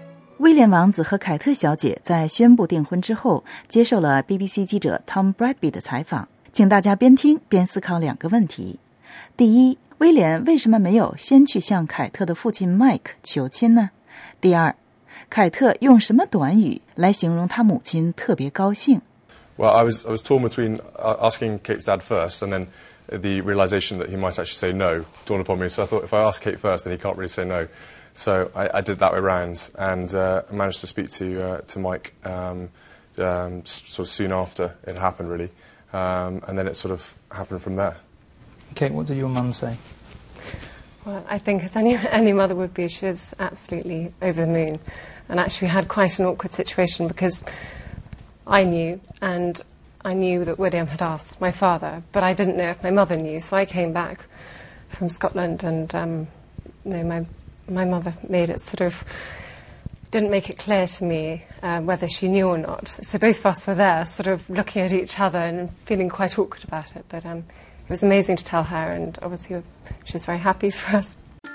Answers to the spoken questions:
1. Because he feared that the father might say no.
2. She said that her mother was absolutely over the moon, 心满意足。